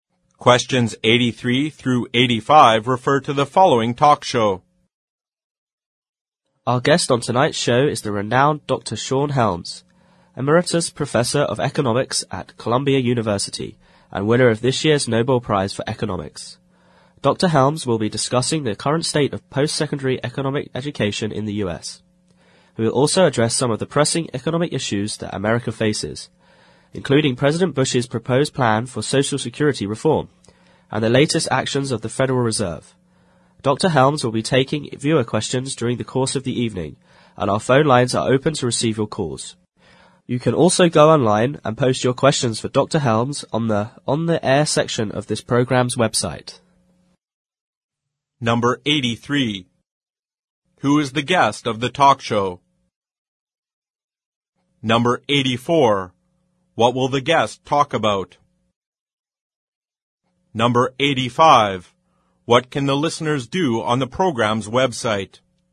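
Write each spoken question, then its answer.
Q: Who is the guest of the talk show?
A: Dr. Sean Helms, a Nobel Prize-winning economics professor

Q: What will the guest talk about?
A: Economic education in the U.S. and pressing economic issues

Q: What can the listeners do on the program's website?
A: Post questions for Dr. Helms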